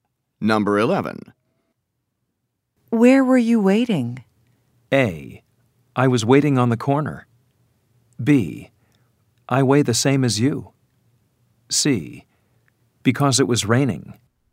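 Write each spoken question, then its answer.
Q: Where were you waiting?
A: A: I was waiting on the corner.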